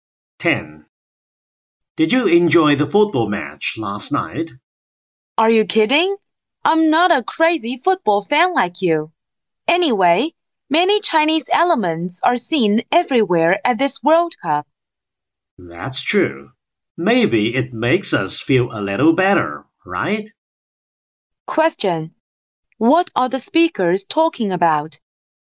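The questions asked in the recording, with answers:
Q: What are the speakers talking about?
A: The World Cup football match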